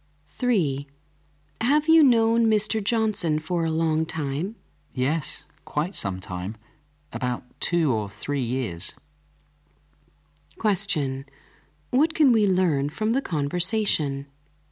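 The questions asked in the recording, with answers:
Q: What can we learn from the conversation?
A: The man has known Mr. Johnson for about 2 or 3 years.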